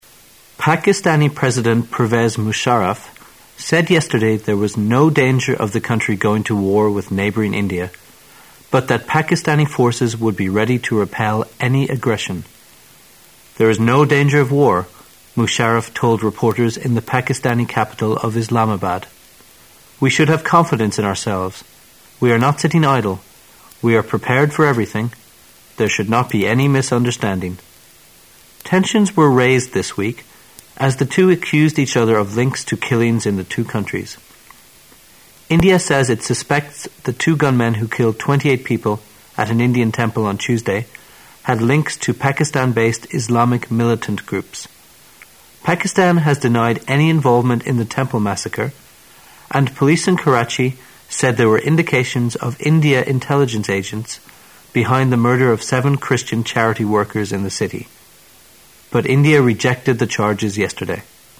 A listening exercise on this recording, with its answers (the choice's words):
Questions 29 and 30 are based on the following news. At the end of the news item, you will be given 10 seconds to answer the questions. Now listen to the news.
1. According to Pakistani President, the chances of the two countries going to war were ______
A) great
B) small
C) growing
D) greater than before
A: small

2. Recent tensions between the two countries were a direct result of______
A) their border conflicts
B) their military build-up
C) killings in the two countries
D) their mutual distrust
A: killings in the two countries

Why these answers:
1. 本题测试对新闻主要内容的理解。根据新闻的前几句,特别是总统的讲话"There is no danger of war",我们可推测总统认为两国发生战争的可能性是不大的,正确答案为B。

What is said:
[解析] 29-30 Pakistani President Pervez Musharraf said yesterday there was no danger of the country going to war with neighboring India, but that Pakistani forces would be ready to repel any aggression. "There is no danger of war," Musharraf told reporters in the Pakistani capital of Islamabad. "We should have confidence in ourselves. We are not sitting idle. We are prepared for everything. There should not be any misunderstanding." Tensions were raised this week as the two accused each other of links to killings in the two countries. India says it suspects the two gunmen who killed 28 people at an Indian temple on Tuesday had links to Pakistan-based Islamic militant groups. Pakistan has denied any involvement in the temple massacre, and police in Karachi said there were indications of India intelligence agents behind the murder of seven Christian charity workers in the city. But India rejected the charges yesterday.